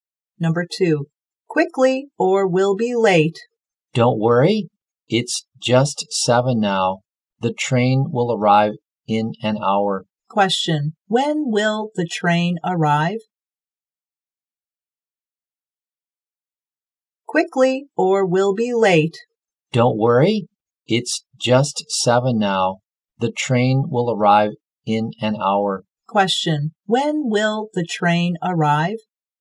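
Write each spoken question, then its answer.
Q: When will the train arrive?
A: At 8 o'clock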